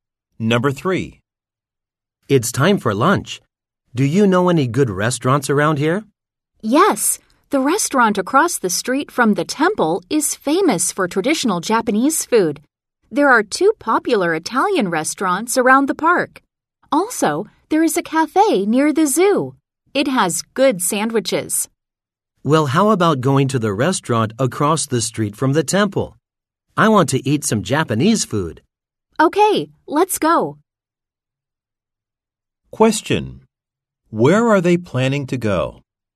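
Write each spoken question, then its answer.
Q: Where are they planning to go?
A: The restaurant across the street from the temple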